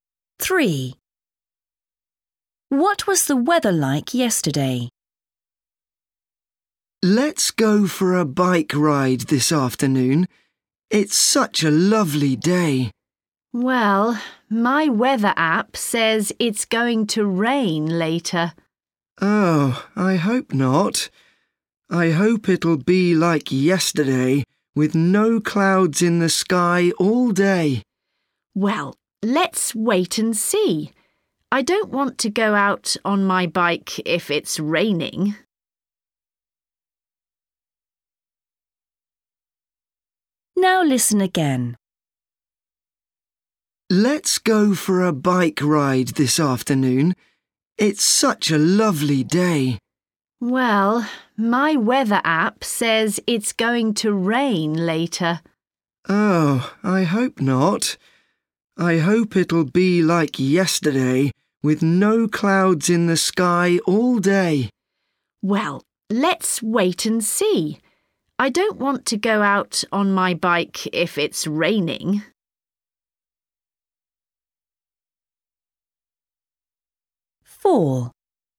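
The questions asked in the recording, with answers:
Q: What was the weather like yesterday?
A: sunny, with no clouds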